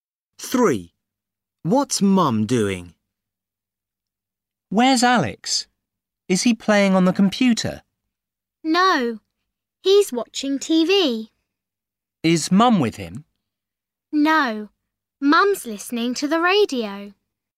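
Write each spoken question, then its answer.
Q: What's Mum doing?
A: listening to the radio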